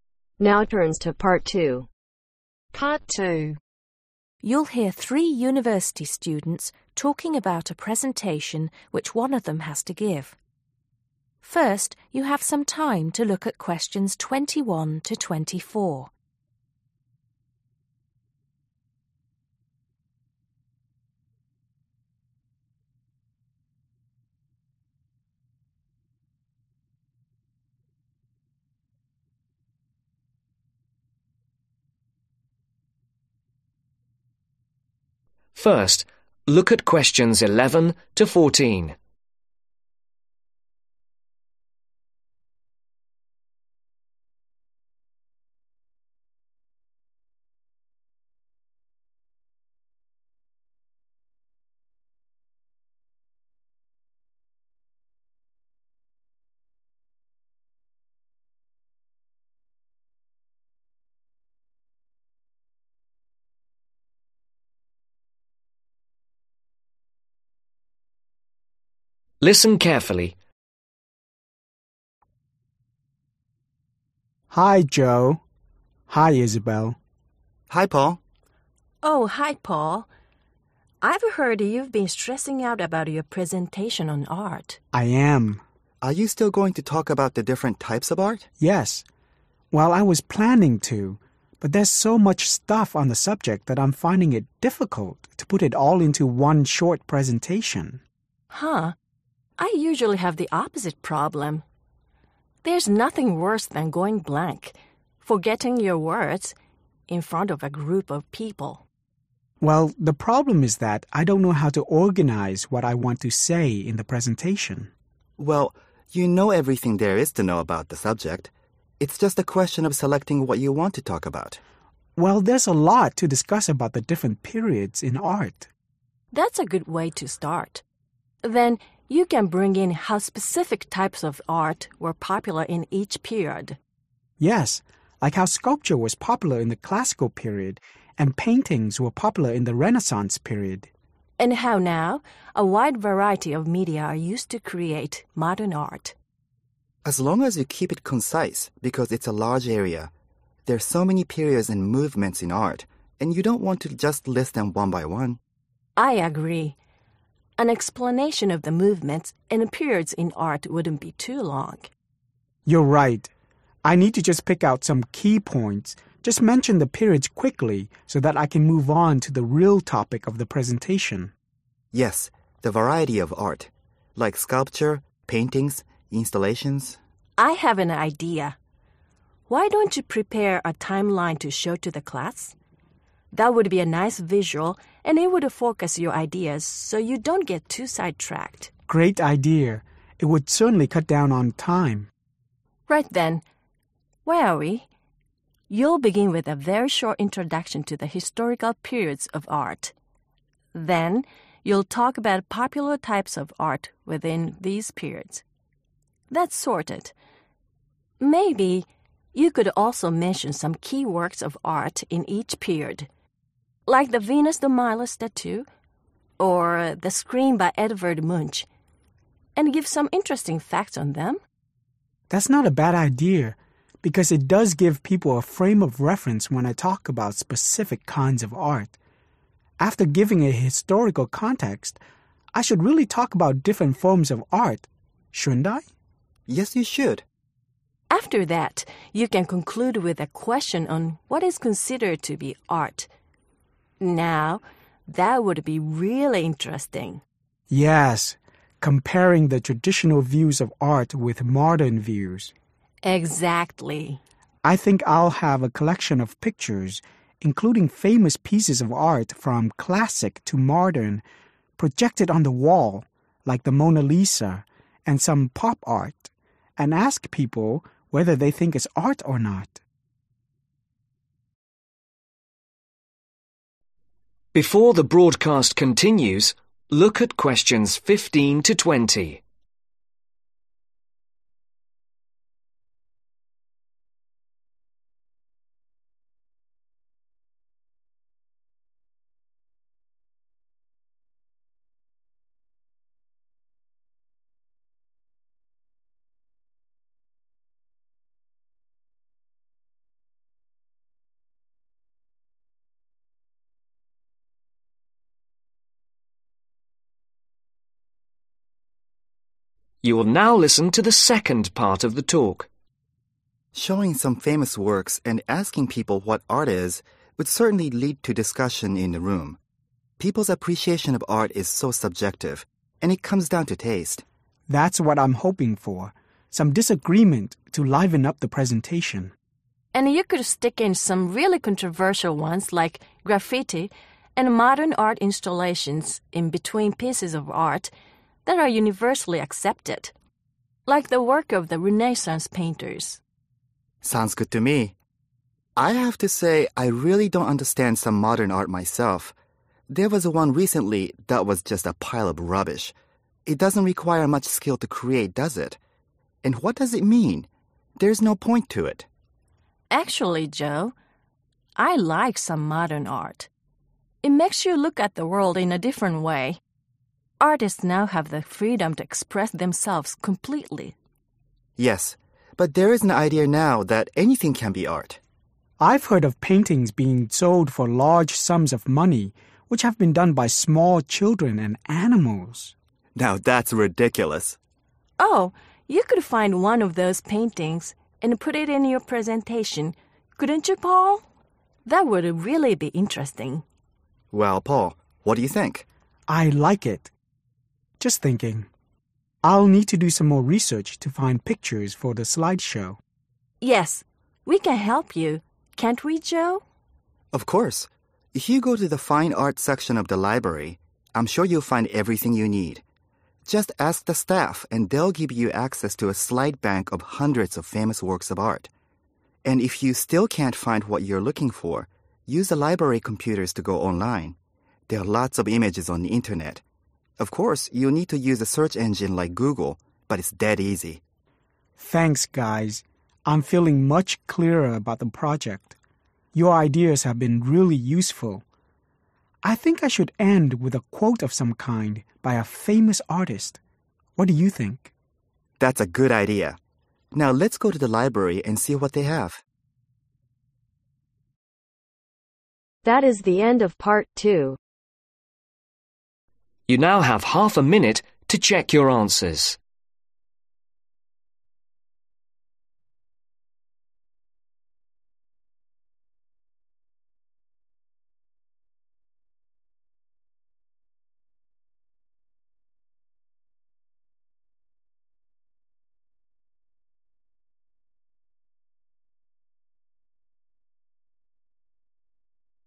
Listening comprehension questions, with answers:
Choose the correct letter A , B or C.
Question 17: - go to fine art section in (17)............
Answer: (the) Library

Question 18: - ask (18)............ for access to slide bank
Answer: (the) Staff

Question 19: - if not, use the (19)............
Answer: Computers

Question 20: - find pictures using a (20)............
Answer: Search engine